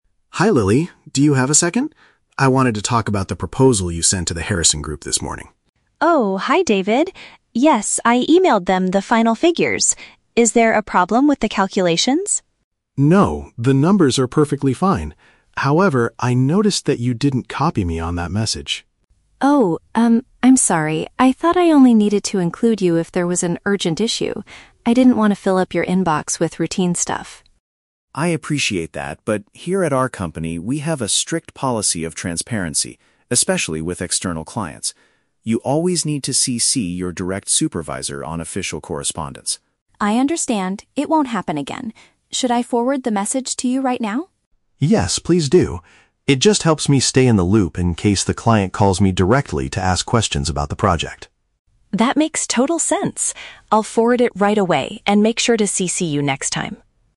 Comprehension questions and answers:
Listen to the conversation between a manager and a new employee, then choose the correct answer (A, B, or C).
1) What is the main reason David is speaking to Lily?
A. To point out a mathematical mistake she made in a report.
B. To remind her of a rule regarding electronic communication.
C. To ask her to write a completely new proposal for a partner.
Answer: B. To remind her of a rule regarding electronic communication.

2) Why did Lily fail to include David in her message to the client?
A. She was trying to avoid sending him unnecessary emails.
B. She assumed managers only wanted to read confidential files.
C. She forgot to check the recipient list before clicking send.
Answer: A. She was trying to avoid sending him unnecessary emails.

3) According to David, how does receiving these emails benefit him?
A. It gives him a chance to forward the messages to the executive board.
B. It allows him to correct any spelling errors before the client sees them.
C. It keeps him informed so he can easily answer potential customer inquiries.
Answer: C. It keeps him informed so he can easily answer potential customer inquiries.

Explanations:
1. David is talking to Lily because she didn't "copy me on that message" (CC him on the email), which is part of the company's "strict policy of transparency" (a rule regarding electronic communication). Why the trap is wrong: Option (A) is a trap. Lily asks if there is a "problem with the calculations" (mathematical mistake), but David clearly says "the numbers are perfectly fine." Option (C) is a plausible workplace task, but he never asks her to write a new proposal.
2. Lily explains her action by saying, "I didn't want to fill up your inbox with routine stuff." Option A accurately paraphrases this as "trying to avoid sending him unnecessary emails." Why the trap is wrong: Option (B) is a trap. She thought she only needed to include him for an "urgent issue," not "confidential files." Option (C) is a very common email mistake in real life, making it a plausible distractor, but it is not the reason she gave in the audio.
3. David says being copied helps him "stay in the loop" (keeps him informed) in case the client calls to "ask questions" (answer potential customer inquiries). Why the trap is wrong: Option (A) is a trap. The word "forward" is used in the audio, but Lily is the one forwarding the message to David, not David forwarding it to a board. Option (B) is a logical reason for a manager to review an email, but David did not mention checking for spelling errors.

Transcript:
David: Hi Lily, do you have a second? I wanted to talk about the proposal you sent to the Harrison Group this morning.
Lily: Oh, hi David. Yes, I emailed them the final figures. Is there a problem with the calculations?
David: No, the numbers are perfectly fine. However, I noticed that you didn't copy me on that message.
Lily: Oh, um, I'm sorry. I thought I only needed to include you if there was an urgent issue. I didn't want to fill up your inbox with routine stuff.
David: I appreciate that, but here at our company, we have a strict policy of transparency, especially with external clients. You always need to CC your direct supervisor on official correspondence.
Lily: I understand. It won't happen again. Should I forward the message to you right now?
David: Yes, please do. It just helps me stay in the loop in case the client calls me directly to ask questions about the project.
Lily: That makes total sense. I'll forward it right away and make sure to CC you next time.

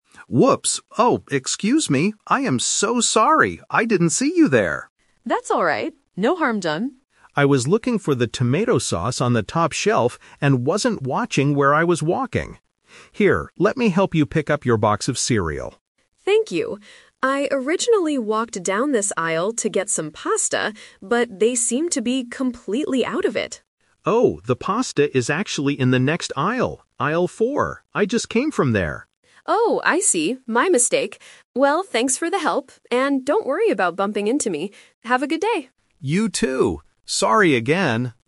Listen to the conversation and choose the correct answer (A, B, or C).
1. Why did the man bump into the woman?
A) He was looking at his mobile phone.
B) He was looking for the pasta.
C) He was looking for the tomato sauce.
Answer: C) He was looking for the tomato sauce.

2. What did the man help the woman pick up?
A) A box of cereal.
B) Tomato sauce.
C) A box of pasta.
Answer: A) A box of cereal.

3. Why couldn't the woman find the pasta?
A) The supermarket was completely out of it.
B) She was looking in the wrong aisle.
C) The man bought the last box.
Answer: B) She was looking in the wrong aisle.

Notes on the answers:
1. Option (A) is a very common reason for bumping into people, but it is not mentioned. Option (B) is a trap because the woman is the one looking for pasta, not the man.
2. The man says, "Here, let me help you pick up your box of cereal." Trap: Option (B) is the item the man wanted. Option (C) is the "Twist" trap. The woman wanted to buy pasta, but she was holding cereal when the man bumped into her.
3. The man tells her, "the pasta is actually in the next aisle". The woman then replies, "My mistake." Trap: Option (A) is a trap. The woman thought they were out of it ("they seem to be completely out of it"), but the reality (the twist) is that she was just in the wrong place.

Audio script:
Man: Whoops! Oh, excuse me. I am so sorry! I didn't see you there.
Woman: That's alright. No harm done.
Man: I was looking for the tomato sauce on the top shelf and wasn't watching where I was walking. Here, let me help you pick up your box of cereal.
Woman: Thank you. I originally walked down this aisle to get some pasta, but they seem to be completely out of it.
Man: Oh, the pasta is actually in the next aisle, aisle four. I just came from there.
Woman: Oh, I see! My mistake. Well, thanks for the help, and don't worry about bumping into me. Have a good day!

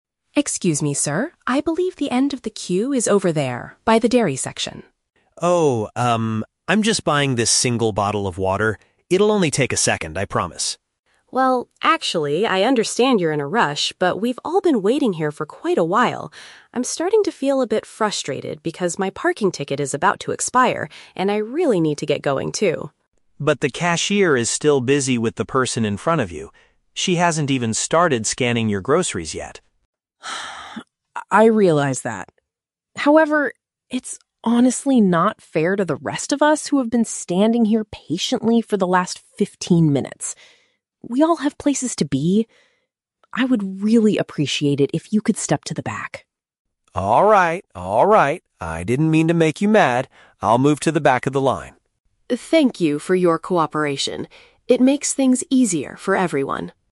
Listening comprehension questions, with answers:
Listen to a conversation between two people at a supermarket checkout. Choose the correct answer (A, B, or C) for each question.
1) Why is the woman feeling annoyed?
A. Because the cashier is working too slowly.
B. Because she has to pay extra for her parking soon.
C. Because she couldn't find the water she wanted to buy.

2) What excuse does the man give for cutting the line?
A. He claims his purchase will be extremely quick.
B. He says he has been standing there for fifteen minutes.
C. He argues that he didn't see the end of the queue.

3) How does the woman handle her frustration?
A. By shouting at the man to leave the supermarket.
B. By controlling her temper and explaining her point politely.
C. By calling the supermarket manager to resolve the issue.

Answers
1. B. Because she has to pay extra for her parking soon.
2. A. He claims his purchase will be extremely quick.
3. B. By controlling her temper and explaining her point politely.

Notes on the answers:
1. The woman says she is frustrated because her "parking ticket is about to expire," which means she will have to pay more or get a fine soon. Option (A) is a trap; the cashier is mentioned as being "busy," but not the reason for the woman's anger. Option (C) is a trap using the word "water", which is actually the item the man is buying.
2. The man says, "I'm just buying this single bottle of water. It'll only take a second." Option (A) is a perfect paraphrase of this excuse. Option (B) is a trap; "fifteen minutes" is mentioned in the audio, but that is how long the woman and others have been waiting, not the man. Option (C) is plausible in real life, but he didn't say it in the audio.
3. The audio explicitly notes that the woman takes a "deep, audible breath" to stay calm, and she uses polite phrases like "I would really appreciate it." Option (A) is a trap; she tells him to step back, but she does not shout or tell him to leave the supermarket entirely. Option (C) is not mentioned.

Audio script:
Customer A (Woman): Excuse me, sir. I believe the end of the queue is over there, by the dairy section.
Customer B (Man): Oh, um, I'm just buying this single bottle of water. It'll only take a second, I promise.
Customer A: Well, actually, I understand you're in a rush, but we've all been waiting here for quite a while. I'm starting to feel a bit frustrated because my parking ticket is about to expire, and I really need to get going too.
Customer B: But the cashier is still busy with the person in front of you. She hasn't even started scanning your groceries yet.
Customer A: I realize that. However, it's honestly not fair to the rest of us who have been standing here patiently for the last fifteen minutes. We all have places to be. I would really appreciate it if you could step to the back.
I didn't mean to make you mad. I'll move to the back of the line.

